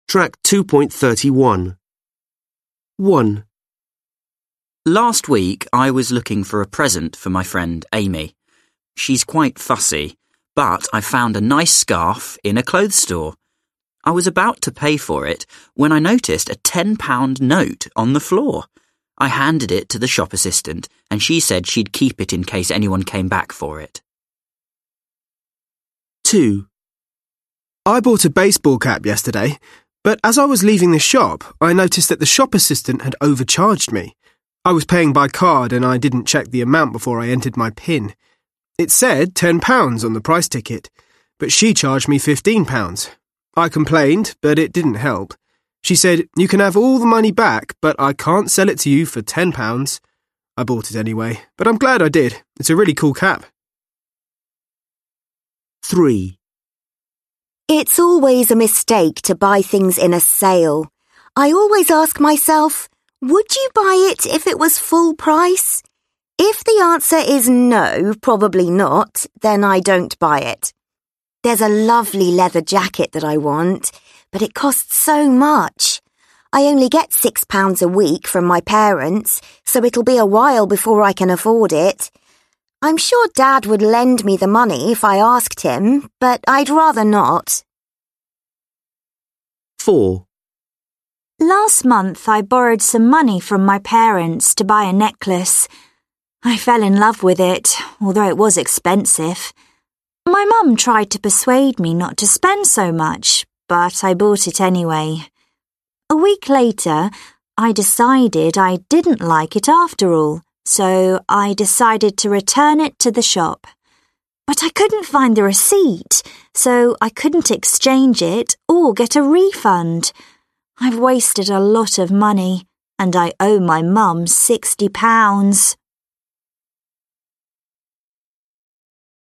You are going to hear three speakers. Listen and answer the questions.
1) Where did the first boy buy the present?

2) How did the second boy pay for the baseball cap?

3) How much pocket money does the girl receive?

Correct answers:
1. He bought it in a clothes store.
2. He paid by card.
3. She received £6 a week.

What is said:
1. Last week, I was looking for a present for my friend Amy. She's quite fussy but I found a nice scarf in a clothes store. I was about to pay for it,
when I noticed a £10 note on the floor. I handed it to the shop assistant and she said she'd keep it in case anyone came back for it.
2. I bought a baseball cap yesterday. But as I was leaving the check-out I noticed that the shop assistant had overcharged me. I was paying by card and I didn't check the amount before I entered my PIN. It said £10 on the price ticket but she charged me £15. I complained but it didn't help. She said, "You can have all the money back but I can't send it to you for £10." I bought it anyway, but I'm glad I did. Although it's quite expensive, it's a brilliant cap.
3. It's always a mistake to buy things in a sale. I always ask myself, "Would you buy it if was full price?' If the answer is 'No, probably
not', then I don't buy it. There's a lovely leather jacket that I want but it costs so much! I only get £6 a week from my parents so I'll have to wait a while before I can afford it. I'm sure Dad would lend me the money if I asked him, but I'd rather not.

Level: Lớp 10